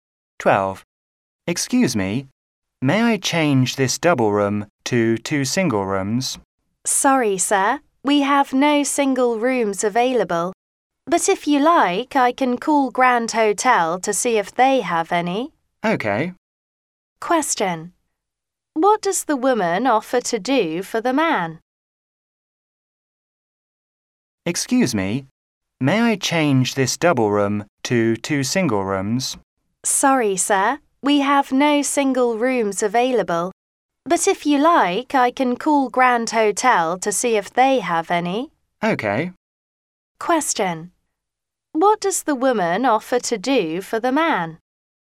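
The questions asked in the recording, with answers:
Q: What does the woman offer to do for the man?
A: Call Grand Hotel to see if they have single rooms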